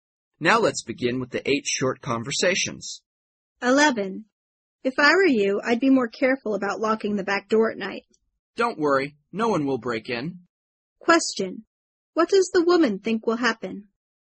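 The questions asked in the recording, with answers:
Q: What does the woman think will happen?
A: No one will break in.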